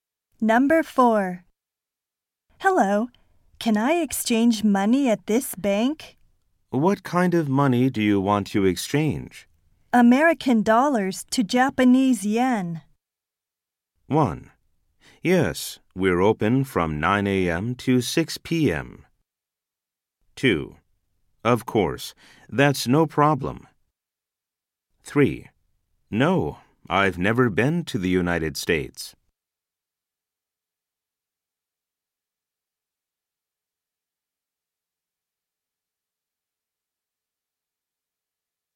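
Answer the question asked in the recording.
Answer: 2: Of course, that's no problem.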